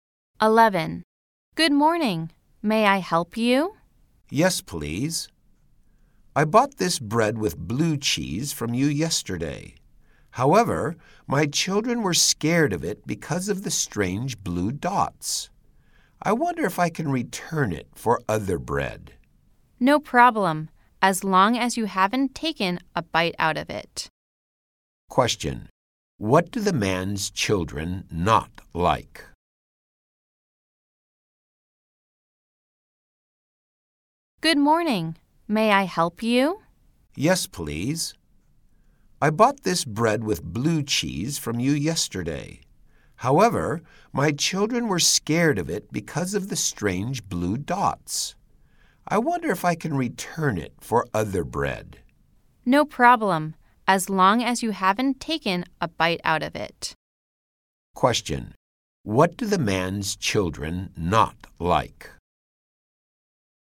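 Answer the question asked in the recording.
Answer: The bread with blue cheese, because of its strange blue dots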